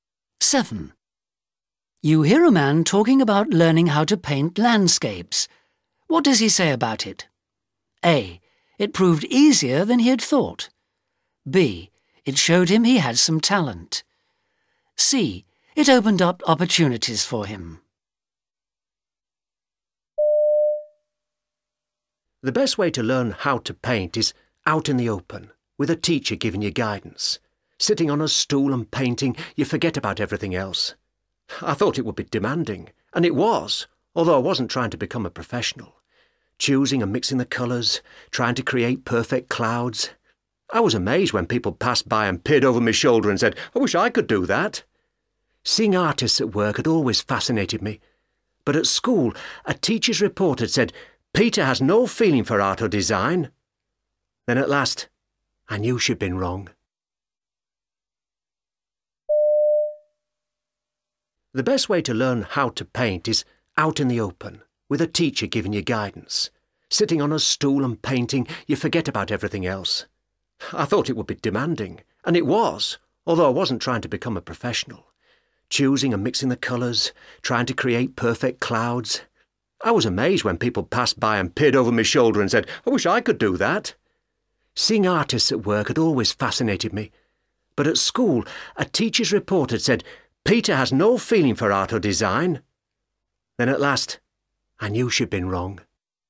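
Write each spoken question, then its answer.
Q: What does he say about it?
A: B: It showed him he had some talent.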